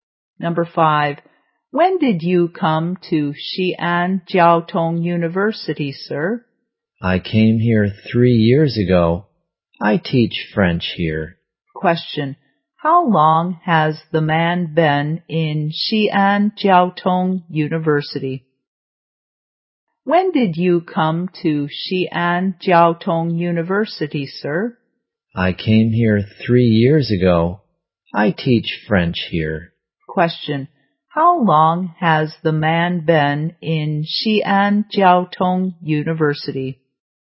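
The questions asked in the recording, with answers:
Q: How long has the man been in Xi'an Jiaotong University?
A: For 3 years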